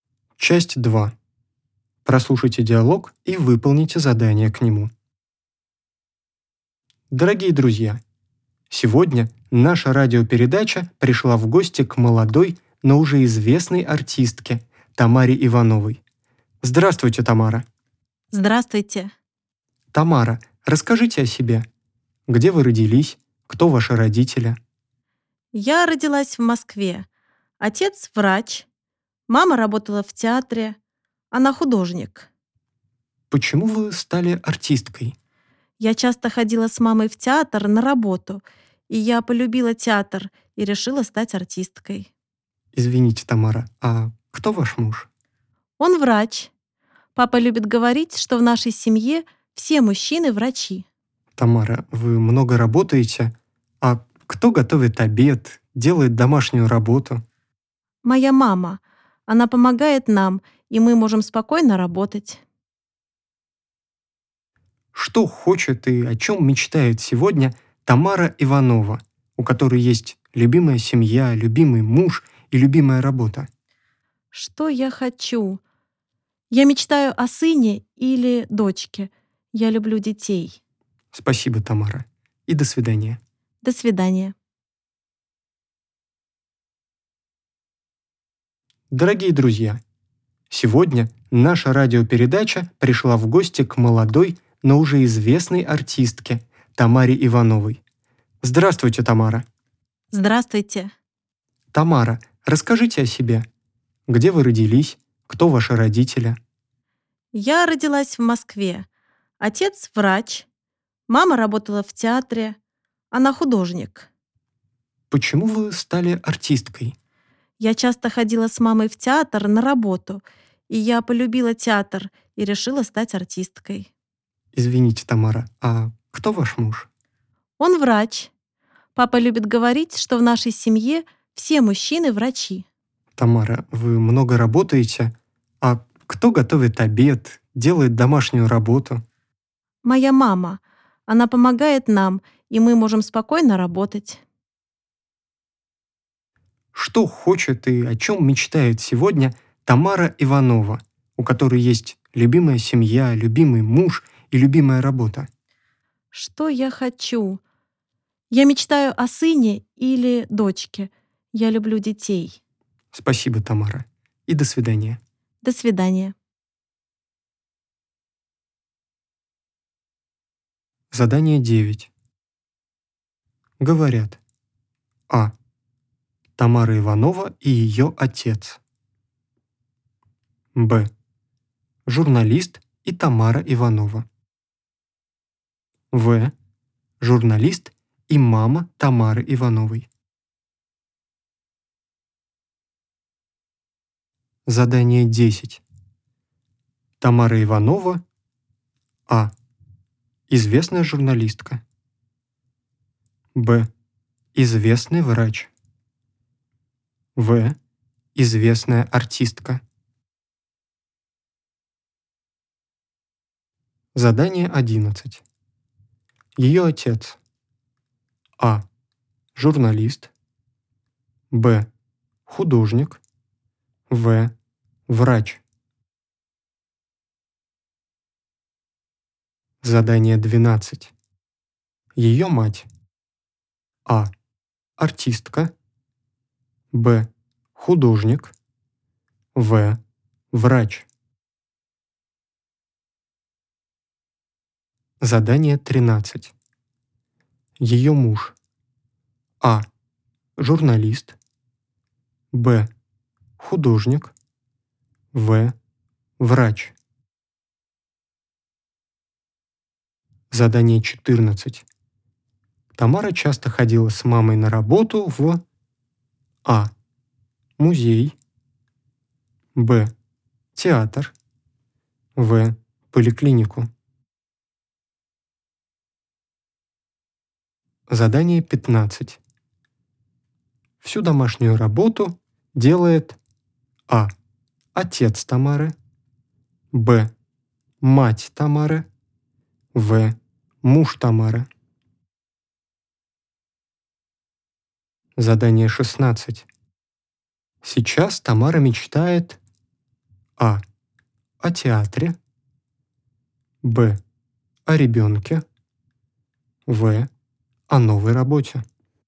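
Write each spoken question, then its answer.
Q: Говорят.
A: Б: Журналист и Тамара Иванова.

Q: Тамара Иванова.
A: В: Известная артистка.

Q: Ее отец.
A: В: Врач.

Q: Ее мать.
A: Б: Художник.

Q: Ее муж.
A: В: Врач.

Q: Тамара часто ходила с мамой на работу в...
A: Б: Театр.

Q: Всю домашнюю работу делает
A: Б: Мать Тамары.

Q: Сейчас Тамара мечтает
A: Б: О ребенке.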